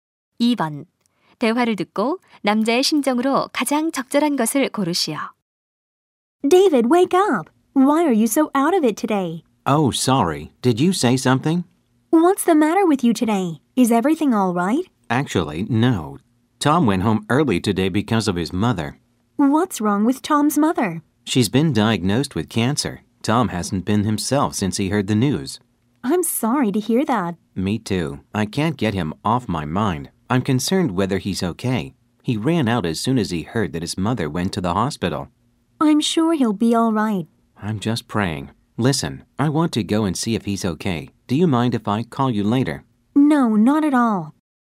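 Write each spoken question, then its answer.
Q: 대화를 듣고 남자의 심정으로 가장 적절한 것을 고르시오.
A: 걱정스러움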